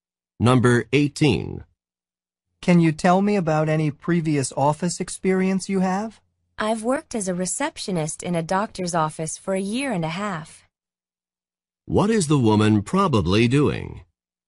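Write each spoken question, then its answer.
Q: What is the woman probably doing?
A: Interviewing for a job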